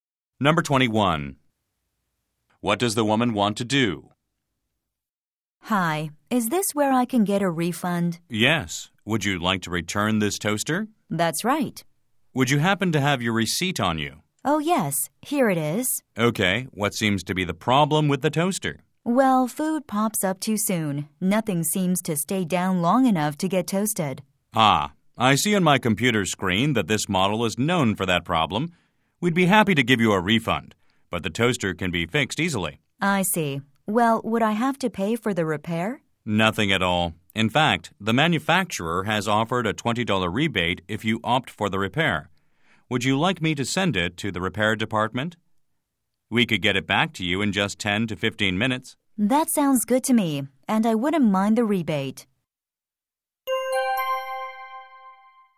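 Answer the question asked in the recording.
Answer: Return her faulty toaster for a refund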